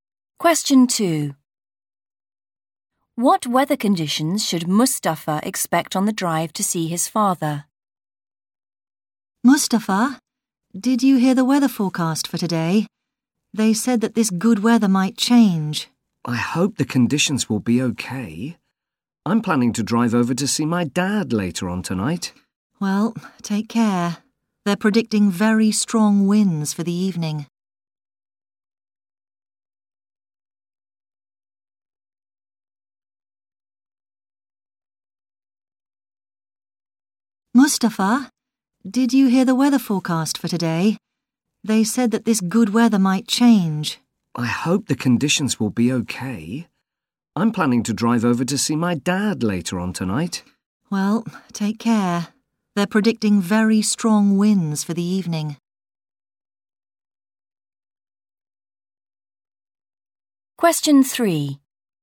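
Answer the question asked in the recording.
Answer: Very strong winds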